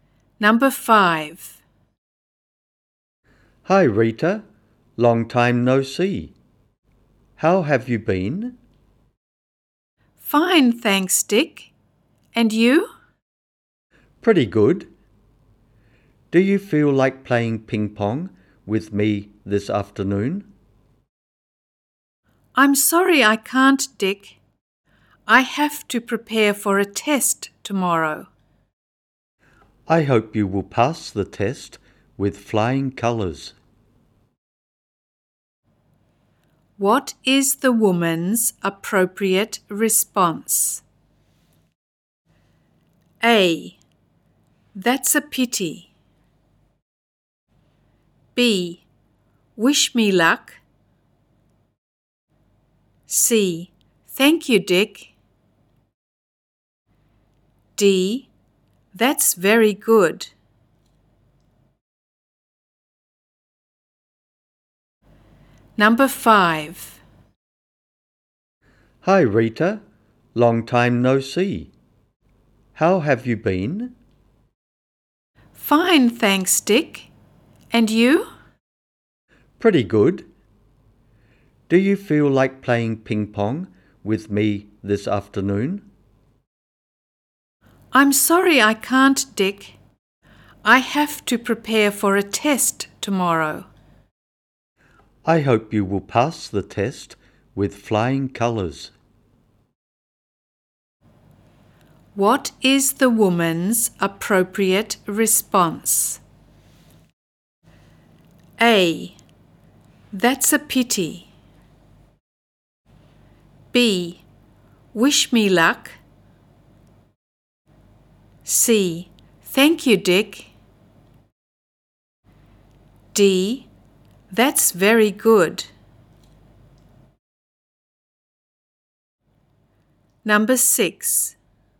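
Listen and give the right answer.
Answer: C: Thank you, Dick.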